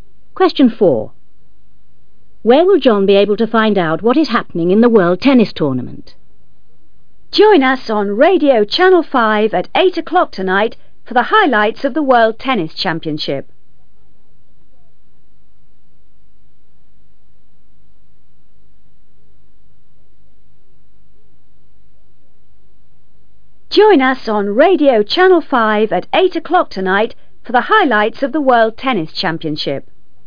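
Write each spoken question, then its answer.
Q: Where will John be able to find out what is happening in the World Tennis Tournament?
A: On Radio Channel 5 (at 8 o'clock tonight)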